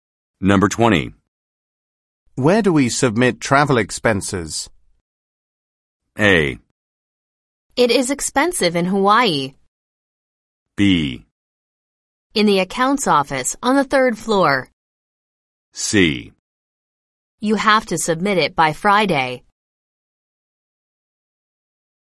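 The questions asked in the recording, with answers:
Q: Where do we submit travel expenses?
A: B: In the accounts office on the third floor.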